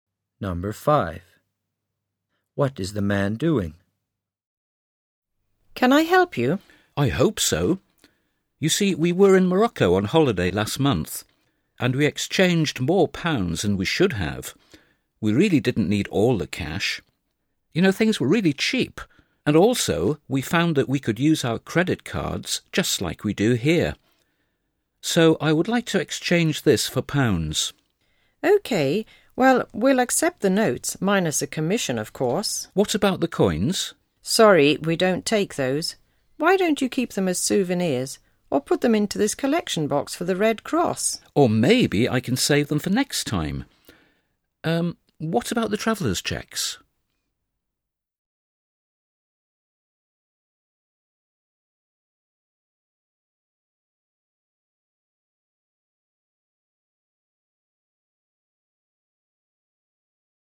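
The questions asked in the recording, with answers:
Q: What is the man doing?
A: Changing money back into pounds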